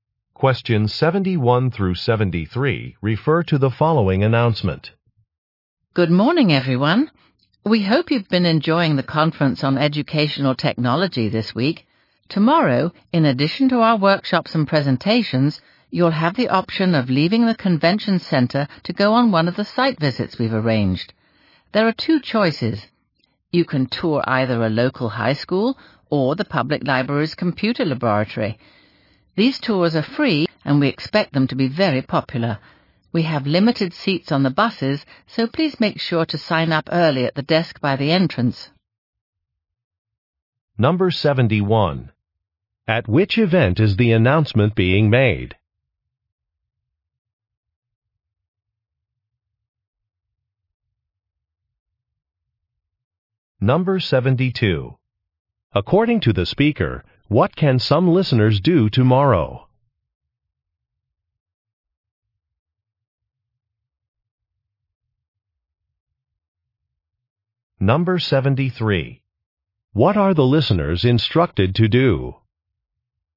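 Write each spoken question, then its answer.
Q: At which event is the announcement being made?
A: A conference on educational technology

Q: According to the speaker, what can some listeners do tomorrow?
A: Go on a site visit (tour a high school or the library's computer lab)

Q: What are the listeners instructed to do?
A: Sign up early at the desk by the entrance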